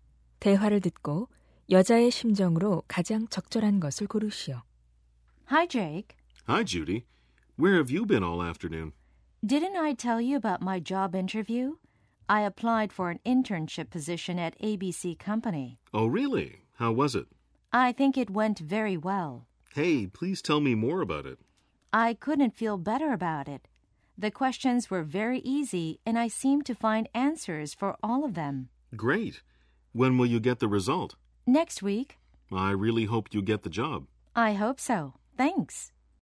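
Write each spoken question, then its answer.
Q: 대화를 듣고 여자의 심정으로 가장 적절한 것을 고르시오.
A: 만족스럽고 자신감 있음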